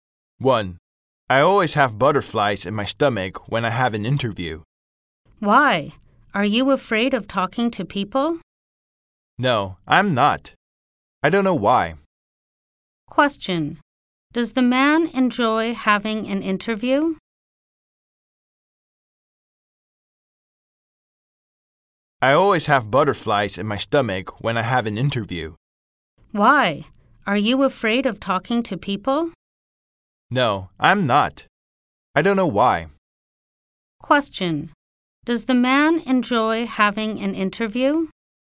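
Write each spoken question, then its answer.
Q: Does the man enjoy having an interview?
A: No, he gets nervous.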